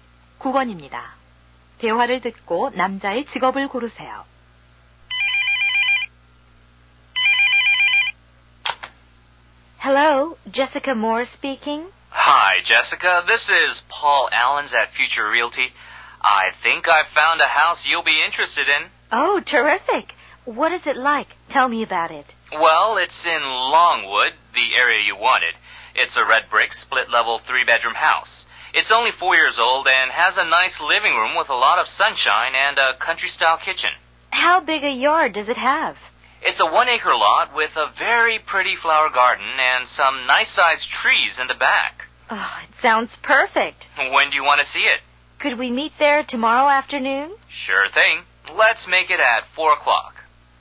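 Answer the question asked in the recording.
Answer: 부동산 중개인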